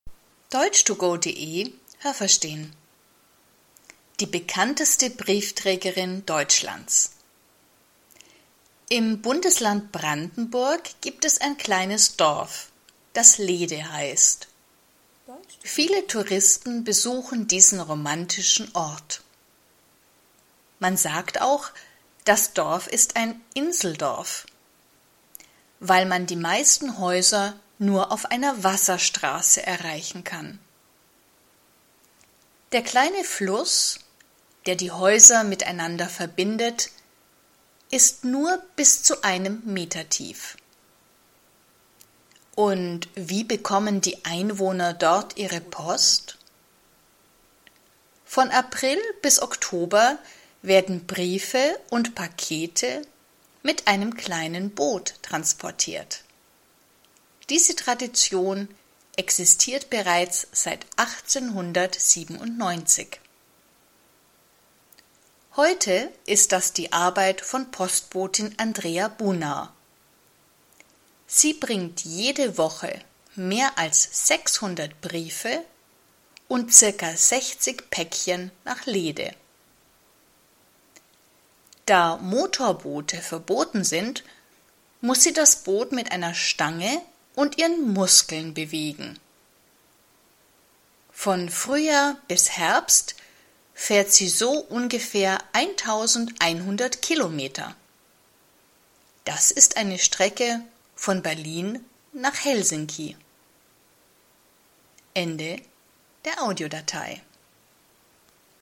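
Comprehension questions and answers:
Was haben Sie gehört? Es gibt nur eine korrekte Antwort.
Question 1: Die meisten Häuser in Lehde kann man nur _____ erreichen.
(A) auf normalen Straßen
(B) auf Wasserstraßen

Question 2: Wie tief ist der Fluss?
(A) nicht tiefer als einen Meter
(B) viel tiefer als einen Meter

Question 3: Die Post wird von _____ bis Oktober mit einem Boot transportiert.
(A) April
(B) Februar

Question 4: Diese Tradition existiert bereits seit _____ .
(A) 1897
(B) 1997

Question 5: Die Postbotin bringt _____ 600 Briefe nach Lehde.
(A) jeden Monat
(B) jede Woche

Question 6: Das Boot der Briefträgerin ...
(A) hat einen Motor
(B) hat keinen Motor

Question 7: Sie fährt von Frühjahr bis Herbst _____ Kilometer.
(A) 11.000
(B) 1.100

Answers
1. B
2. A
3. A
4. A
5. B
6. B
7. B

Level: A2

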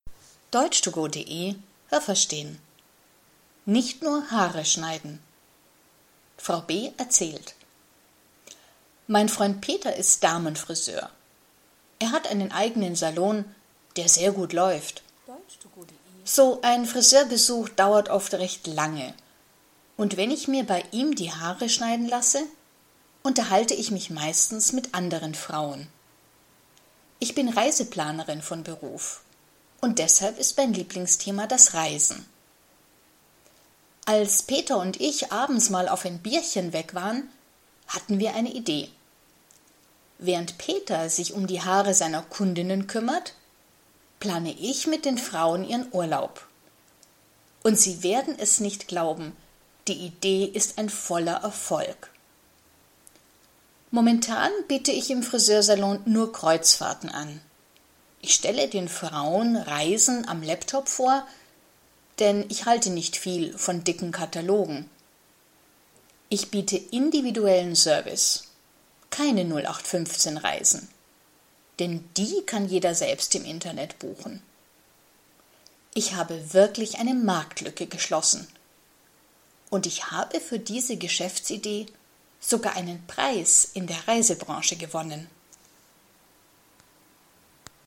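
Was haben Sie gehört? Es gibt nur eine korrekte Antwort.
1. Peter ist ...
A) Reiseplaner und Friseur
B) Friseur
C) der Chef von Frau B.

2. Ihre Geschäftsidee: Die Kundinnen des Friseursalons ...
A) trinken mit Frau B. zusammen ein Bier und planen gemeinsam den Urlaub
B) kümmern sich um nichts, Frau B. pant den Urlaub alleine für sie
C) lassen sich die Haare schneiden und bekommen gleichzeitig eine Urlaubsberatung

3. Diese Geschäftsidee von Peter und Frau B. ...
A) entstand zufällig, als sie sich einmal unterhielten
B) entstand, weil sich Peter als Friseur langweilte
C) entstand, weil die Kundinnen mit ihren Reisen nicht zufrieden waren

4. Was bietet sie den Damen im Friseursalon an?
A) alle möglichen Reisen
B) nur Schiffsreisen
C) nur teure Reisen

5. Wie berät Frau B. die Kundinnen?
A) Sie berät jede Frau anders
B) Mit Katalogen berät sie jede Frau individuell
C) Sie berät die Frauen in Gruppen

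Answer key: 1B, 2C, 3A, 4B, 5A

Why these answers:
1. Er ist Friseur, seine Freundin (Frau B.) ist Reiseplanerin. Er ist ihr Freund, nicht ihr Chef.
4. Sie bietet nur Kreuzfahrten an. Das sind Reisen auf großen Schiffen. Man geht in verschiedenen Häfen an Land und macht Ausflüge.

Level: B1

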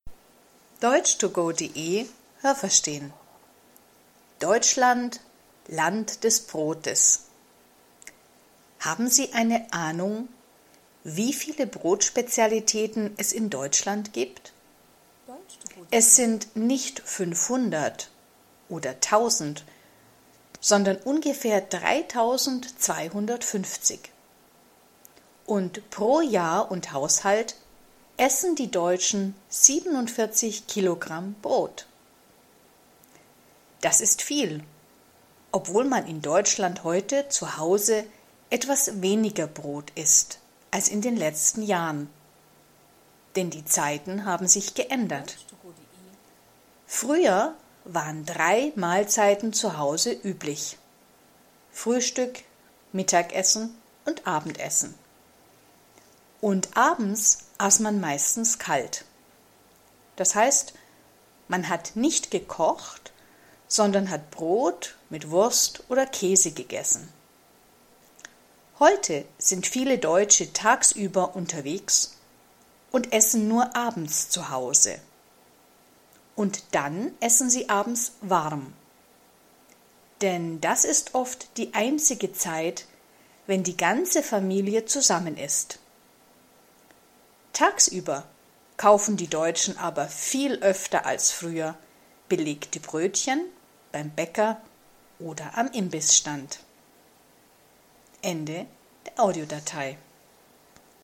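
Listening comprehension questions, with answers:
Was haben Sie gehört? Es gibt nur eine korrekte Antwort.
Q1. Wie viele Brotspezialitäten gibt es in Deutschland?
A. 500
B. 3.250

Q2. Die Deutschen essen pro Jahr und Haushalt _____ Kilo Brot.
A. 74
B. 47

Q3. Die Deutschen essen heute zu Hause ...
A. mehr Brot als früher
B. weniger Brot als früher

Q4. Früher hat man abends meistens ...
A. kalt gegessen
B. warm gegessen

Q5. Heute essen viele Familien abends ...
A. kalt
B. warm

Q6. Viele Familien essen heute abends warm, ...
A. weil die ganze Familie zusammen ist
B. weil die Familie dann fernsieht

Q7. Wenn die Deutschen tagsüber unterwegs sind, essen sie ...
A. mehr belegte Brötchen als früher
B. weniger belegte Brötchen als früher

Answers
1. B
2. B
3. B
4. A
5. B
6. A
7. A

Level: A2

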